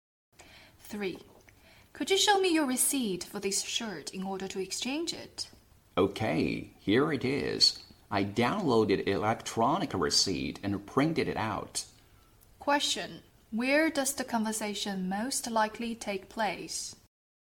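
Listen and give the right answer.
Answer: In a clothing store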